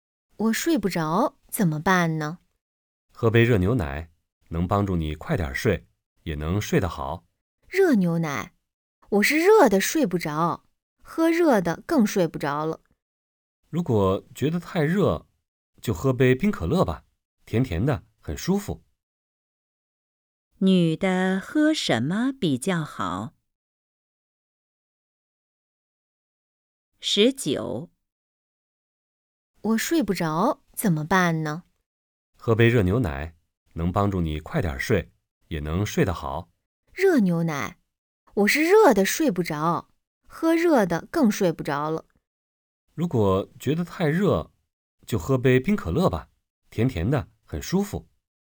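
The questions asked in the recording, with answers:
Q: 女的喝什么比较好?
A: 冰可乐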